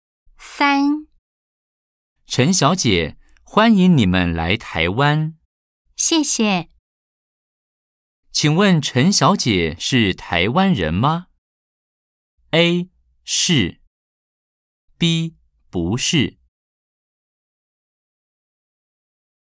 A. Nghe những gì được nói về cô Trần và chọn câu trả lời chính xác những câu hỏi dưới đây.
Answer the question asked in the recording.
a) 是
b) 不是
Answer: b) 不是

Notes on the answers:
陳小姐,歡迎你們來臺灣。